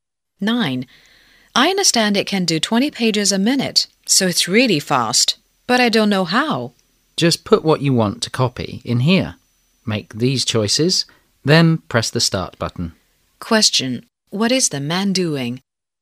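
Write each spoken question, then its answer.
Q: What is the man doing?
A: Learning to use a copy machine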